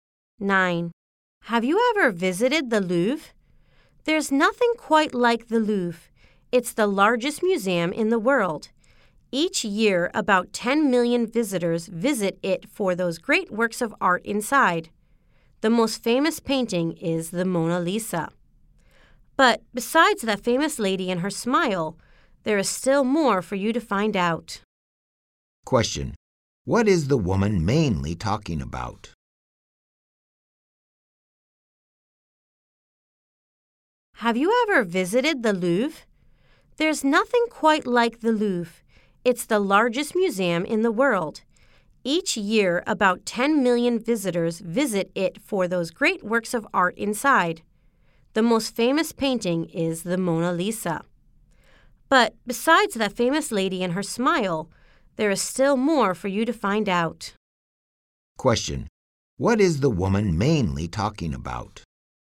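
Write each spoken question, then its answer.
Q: What is the woman mainly talking about?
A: The Louvre museum.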